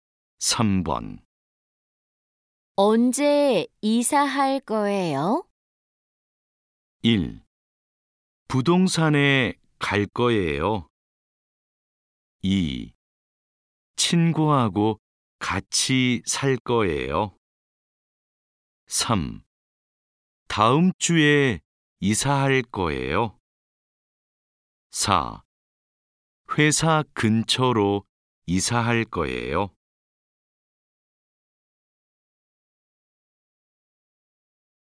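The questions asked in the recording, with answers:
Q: 언제 이사할 거예요?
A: 3: 다음 주에 이사할 거예요.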